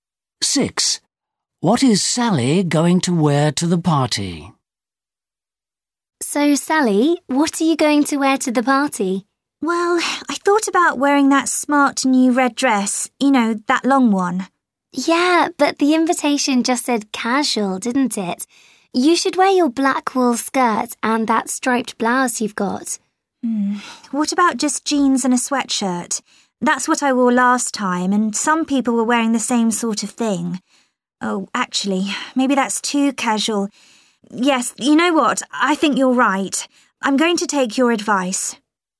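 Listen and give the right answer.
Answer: Her black wool skirt and striped blouse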